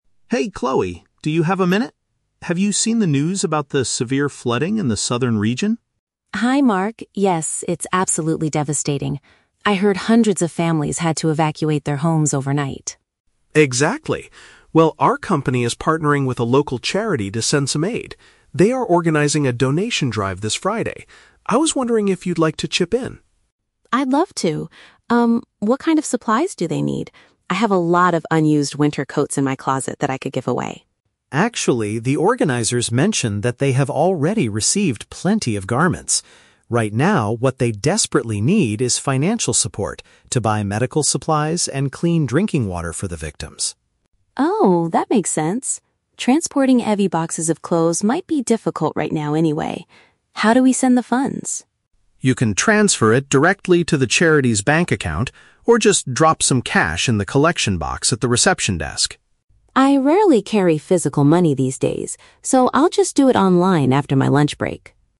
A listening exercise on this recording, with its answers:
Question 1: Why did Mark start the conversation with Chloe?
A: To invite her to participate in a disaster relief effort.

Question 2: According to Mark, what is the most helpful type of donation at the moment?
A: Monetary contributions.

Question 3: How will Chloe make her donation?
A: She will send the money electronically.

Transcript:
Mark: Hey Chloe, do you have a minute? Have you seen the news about the severe flooding in the southern region?
Chloe: Hi Mark. Yes, it's absolutely devastating. I heard hundreds of families had to evacuate their homes overnight.
Mark: Exactly. Well, our company is partnering with a local charity to send some aid. They are organizing a donation drive this Friday. I was wondering if you'd like to chip in.
Chloe: I'd love to. Um, what kind of supplies do they need? I have a lot of unused winter coats in my closet that I could give away.
Mark: Actually, the organizers mentioned that they have already received plenty of garments. Right now, what they desperately need is financial support to buy medical supplies and clean drinking water for the victims.
Chloe: Oh, that makes sense. Transporting heavy boxes of clothes might be difficult right now anyway. How do we send the funds?
Mark: You can transfer it directly to the charity's bank account or just drop some cash in the collection box at the reception desk.
Chloe: I rarely carry physical money these days, so I'll just do it online after my lunch break.